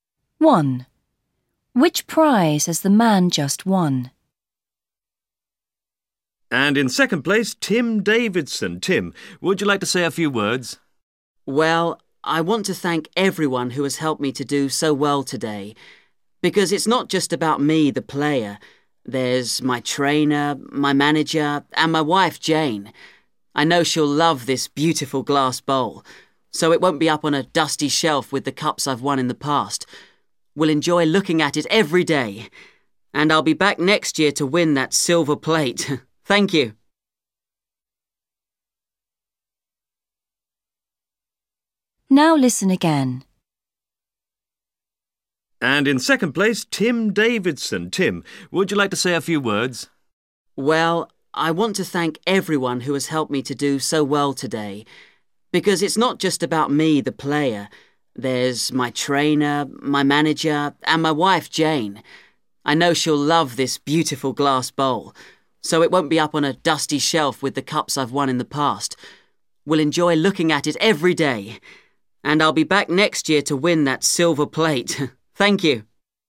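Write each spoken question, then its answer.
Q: Which prize has the man just won?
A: a glass bowl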